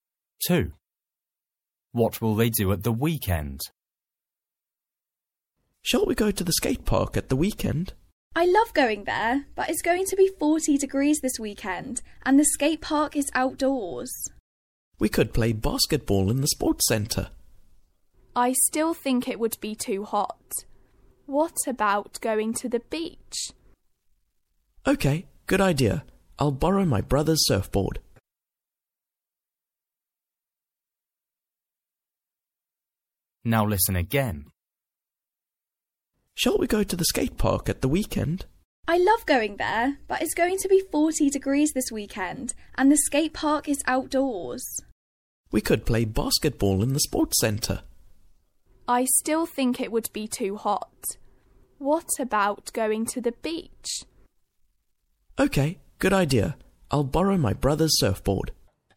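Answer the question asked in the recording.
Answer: Go to the beach (surfing)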